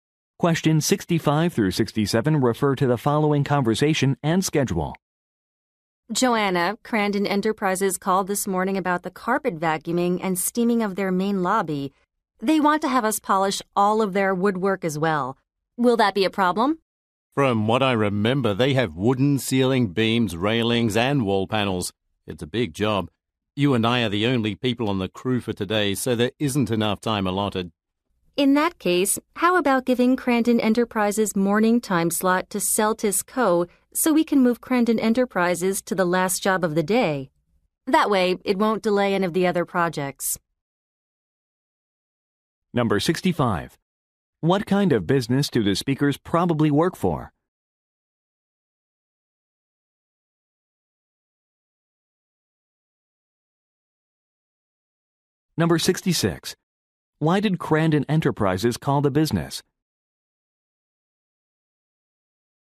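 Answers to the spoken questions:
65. A cleaning company
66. To add woodwork polishing to the job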